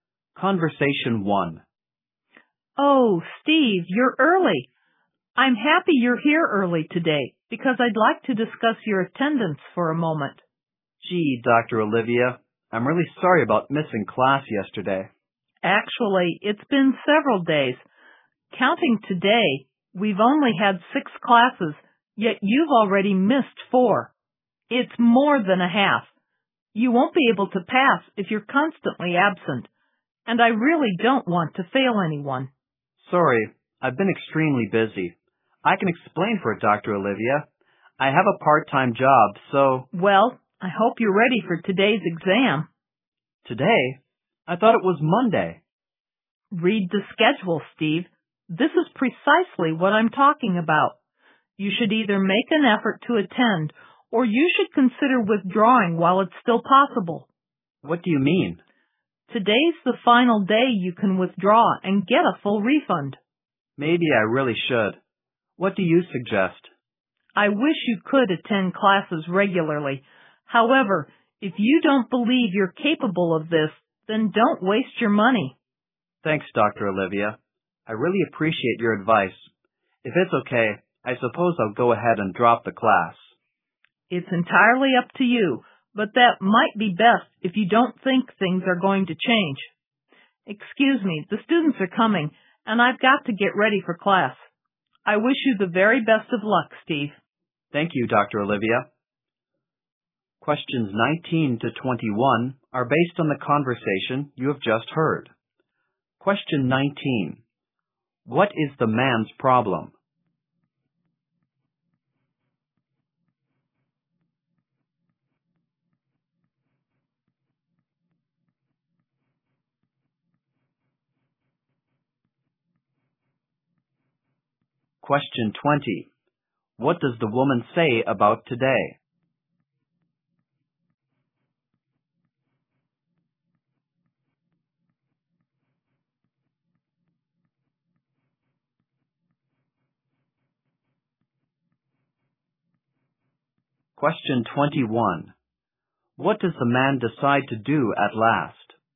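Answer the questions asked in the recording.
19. He has missed too many classes.
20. It is the last day to withdraw with a full refund (and there is an exam).
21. Drop the class.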